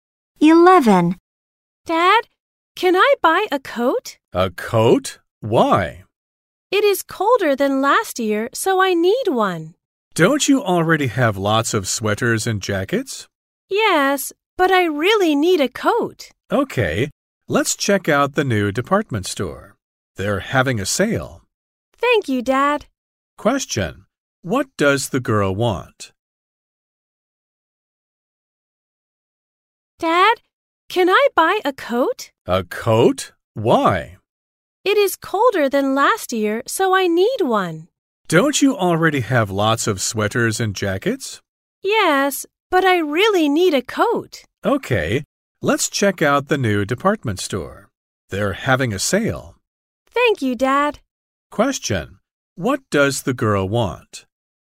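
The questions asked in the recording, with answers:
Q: What does the girl want?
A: A coat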